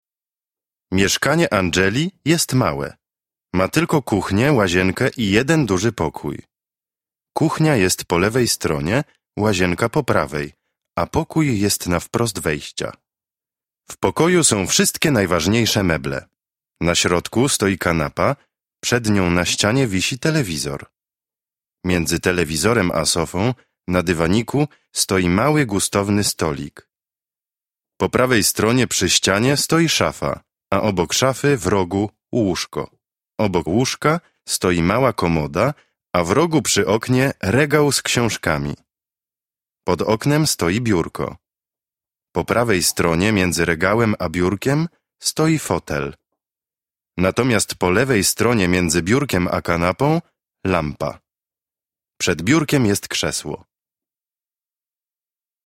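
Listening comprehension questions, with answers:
Proszę posłuchać i uzupełnić.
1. .......... środku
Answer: Na

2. stoi kanapa, ......................... nią na ścianie wisi telewizor.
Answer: przed

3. .............................. telewizorem a sofą, .......... dywaniku stoi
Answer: Między; na

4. .......... prawej stronie .................... ścianie stoi szafa, a .................... szafy, w rogu łóżko.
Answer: Po; przy; obok

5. .................... łóżka stoi mała komoda, a ..... rogu .................... oknie regał z książkami.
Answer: Obok; w; przy

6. ............... oknem stoi biurko.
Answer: Pod

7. prawej stronie, .............................. regałem a biurkiem stoi fotel, natomiast po lewej stronie ..............................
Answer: między; między

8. ......................... biurkiem jest krzesło.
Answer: Przed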